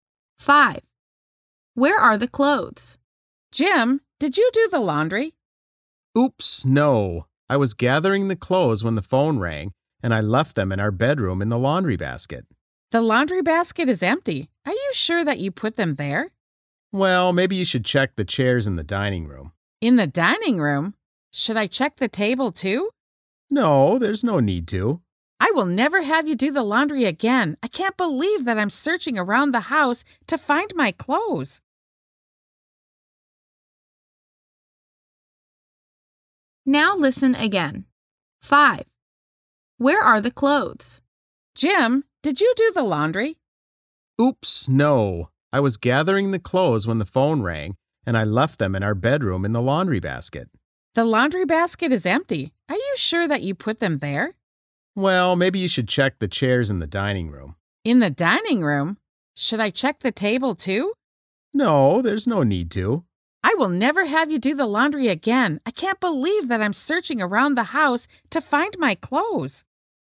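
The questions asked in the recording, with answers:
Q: Where are the clothes?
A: On the chairs in the dining room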